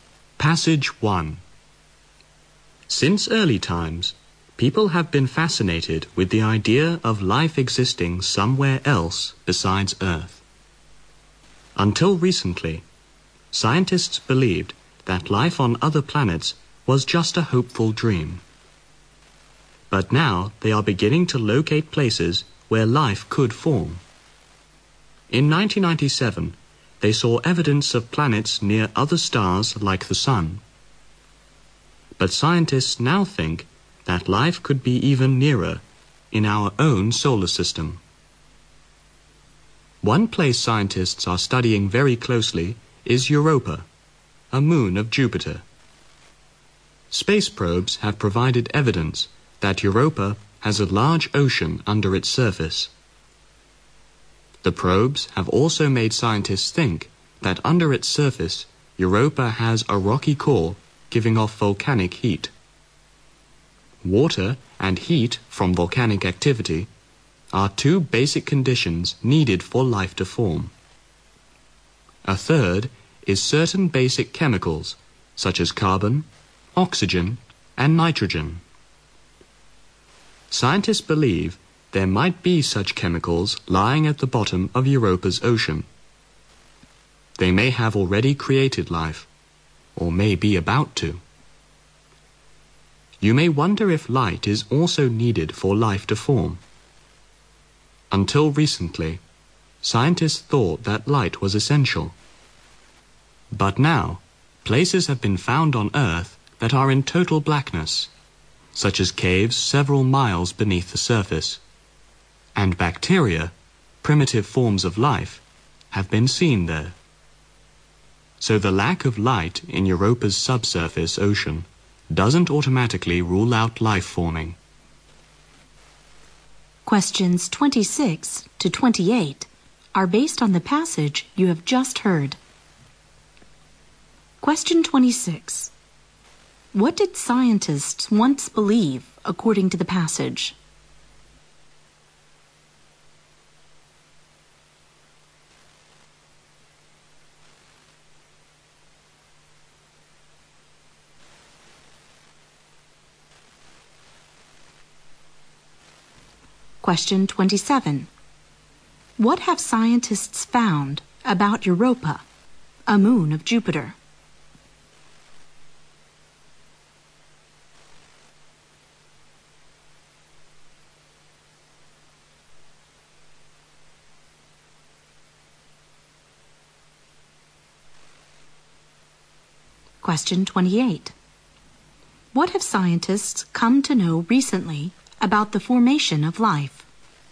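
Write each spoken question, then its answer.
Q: What did scientists once believe according to the passage?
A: Life on other planets was just a hopeful dream

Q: What have scientists found about Europa, a moon of Jupiter?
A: It has a large ocean under its surface

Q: What have scientists come to know recently about the formation of life?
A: Light is not essential for life to form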